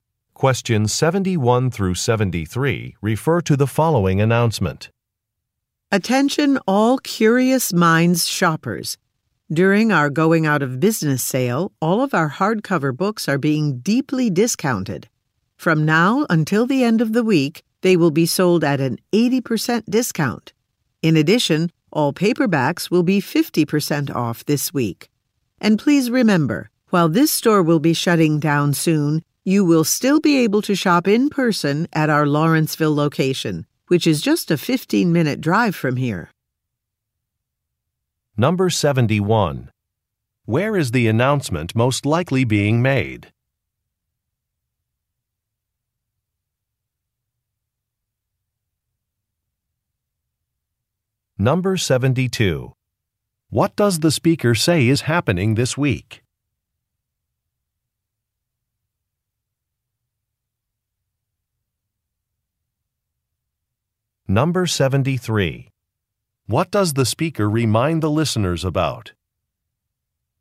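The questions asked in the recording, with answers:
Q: Where is the announcement most likely being made?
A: In a bookstore

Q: What does the speaker say is happening this week?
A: A going-out-of-business sale with discounted books

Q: What does the speaker remind the listeners about?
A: They can still shop at the Lawrenceville location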